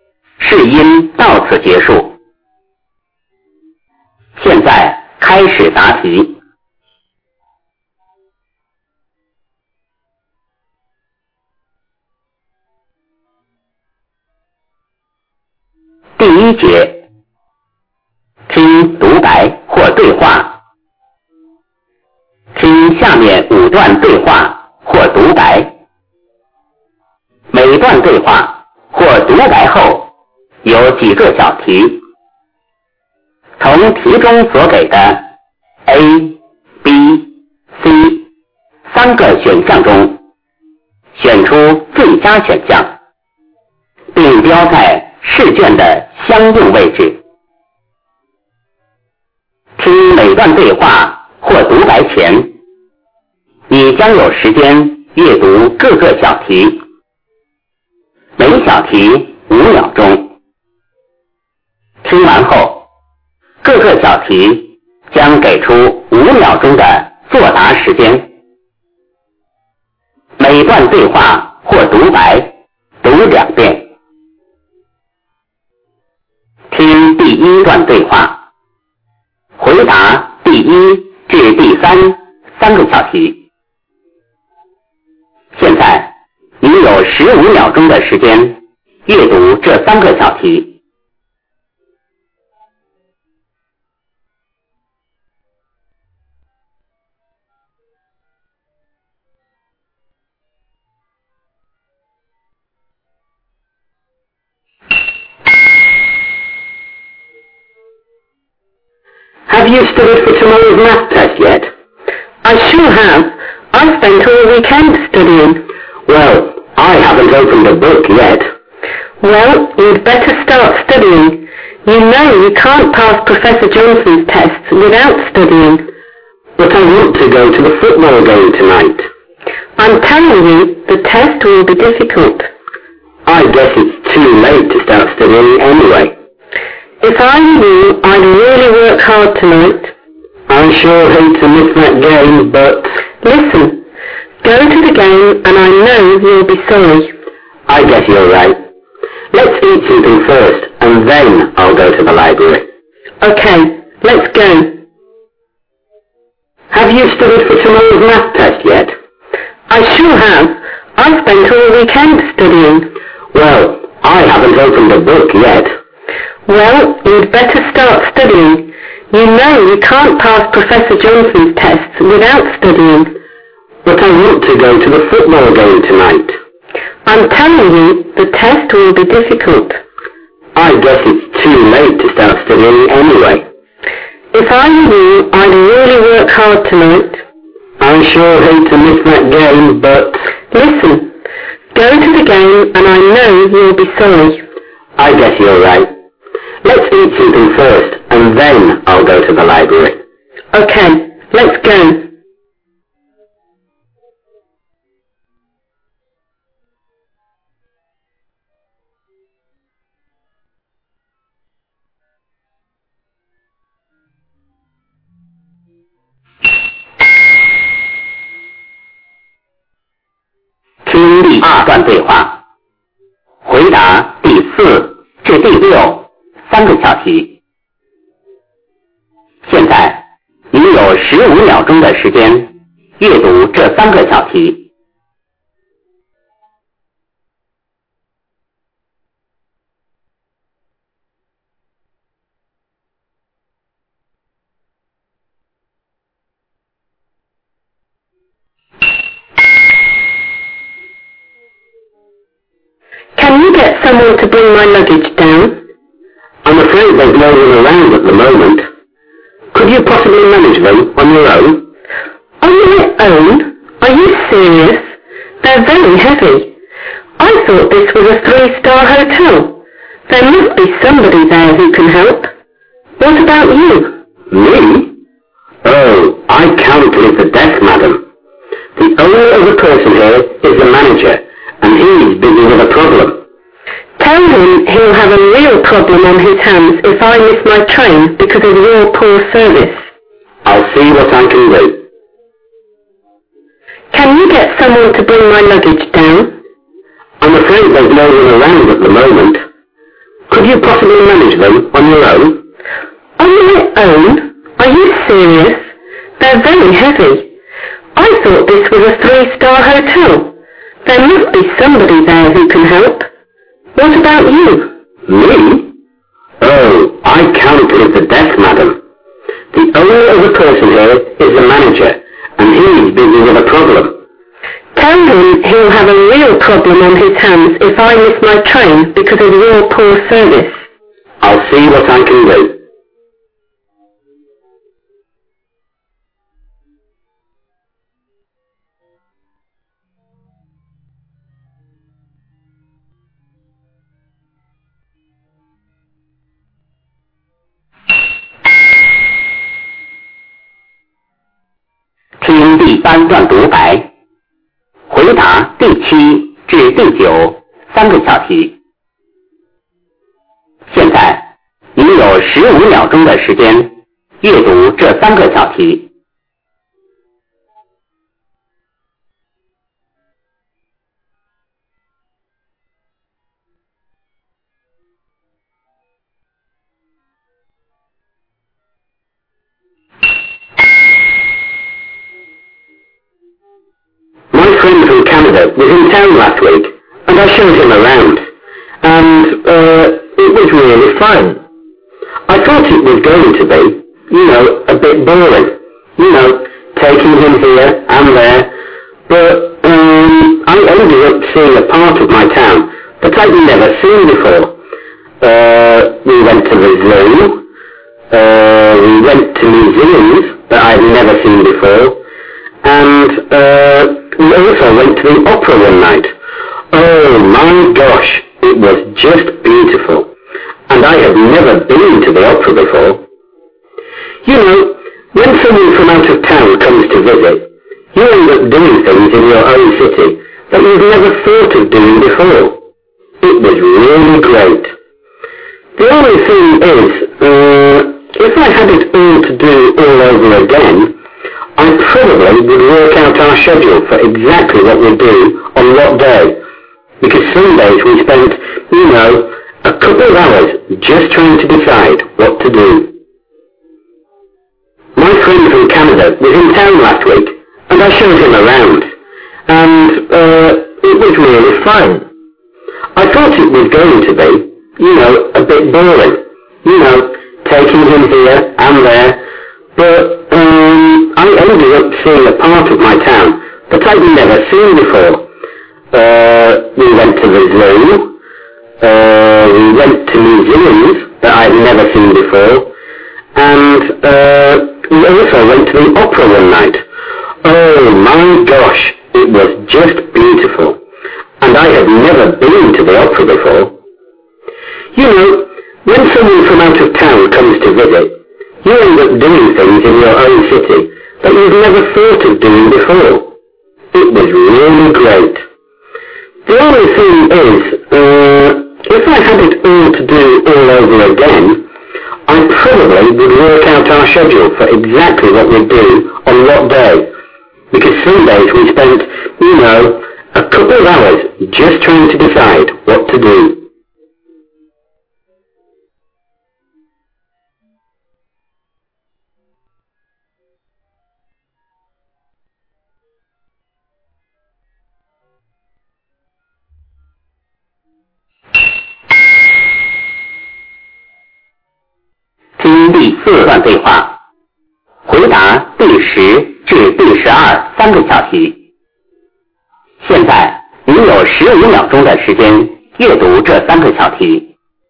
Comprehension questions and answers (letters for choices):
听下面5段对话或独白。每段对话或独白后有几个小题,从题中所给的A、B、C三个选项中选出最佳选项,并标在试卷的相应位置。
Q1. What's the possible relationship between the speakers?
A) Classmates.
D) Mother and son.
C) Teacher and student.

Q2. Why does the woman try to persuade the man to prepare for the exam?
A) Because Professor Johnson will get angry otherwise.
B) Because everyone should pass the exam.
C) Because the test will be difficult.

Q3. What does the man finally decide to do?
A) To study for the test.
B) To watch the football game.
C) To eat something before watching the game.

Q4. Where does the conversation most probably take place?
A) At a railway station.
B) At an airport.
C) In a hotel.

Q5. Why can't the man himself help can3; the luggage?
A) Because he has to report to the manager first.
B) Because he's on the phone at the moment.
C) Because he cannot leave the desk.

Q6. What will the man probably do?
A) He will do nothing for the woman.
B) He will find a way to help her.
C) He himself will send her to the station.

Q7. What places did the speaker take his friend to visit?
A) The opera house, some museums and the library.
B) The zoo, the opera house and some museums.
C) The zoo, the City Hall and the opera house.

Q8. How did the speaker feel after showing his friend around?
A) Happy.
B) Bored.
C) Tired.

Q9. What did the speaker regret?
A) Spending too much time visiting.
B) Visiting the places at different times.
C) Not having planned their visit well.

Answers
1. A
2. C
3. A
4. C
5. C
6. B
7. B
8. A
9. C